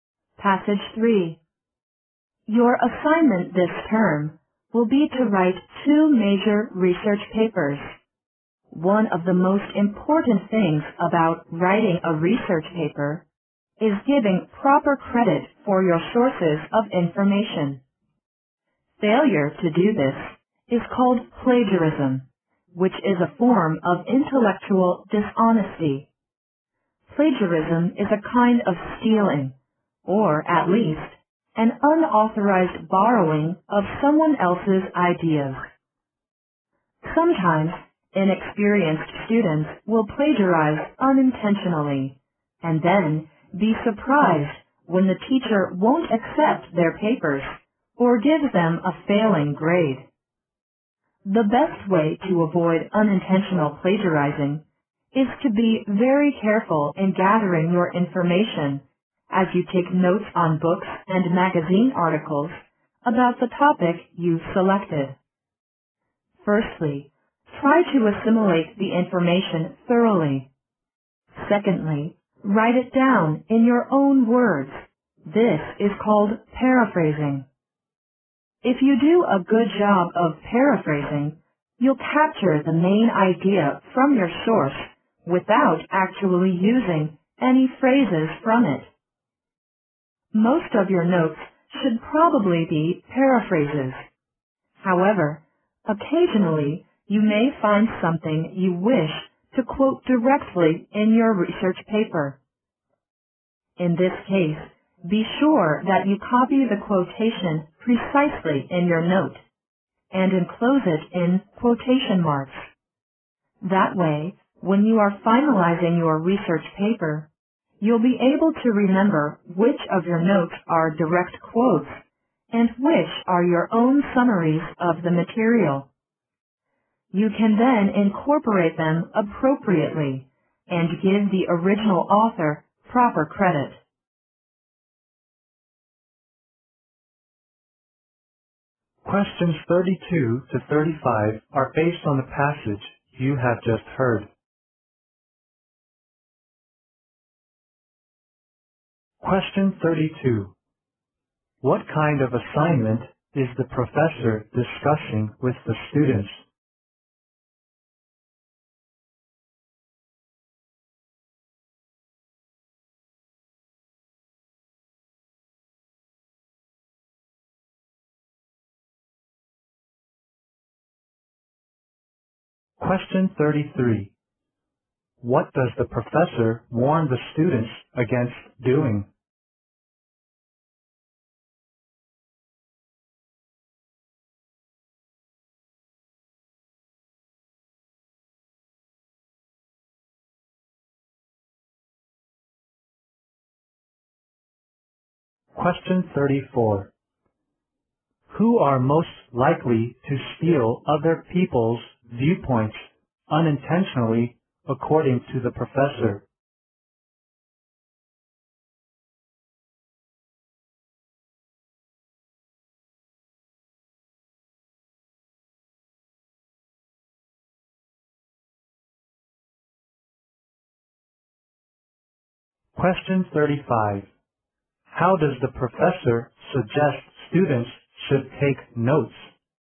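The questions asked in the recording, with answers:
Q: What kind of assignment is the professor discussing with the students?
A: Writing research papers.

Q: What does the professor warn the students against doing?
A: Plagiarism.

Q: Who are most likely to steal other people's viewpoints unintentionally, according to the professor?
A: Inexperienced students.

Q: How does the professor suggest students should take notes?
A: Mostly paraphrase in their own words, putting direct quotes in quotation marks.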